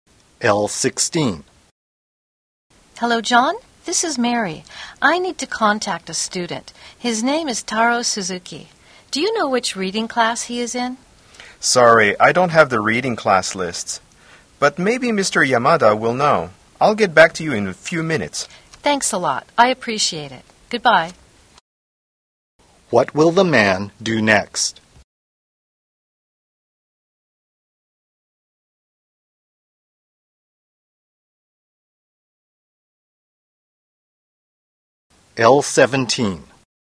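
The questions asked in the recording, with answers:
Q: What will the man do next?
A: Ask Mr. Yamada which reading class Taro is in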